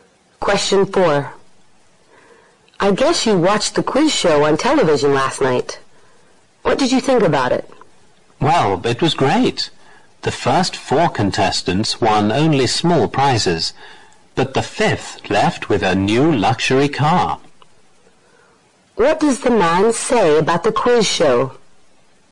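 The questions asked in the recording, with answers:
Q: What does the man say about the quiz show?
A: It was great; the fifth contestant won a new luxury car.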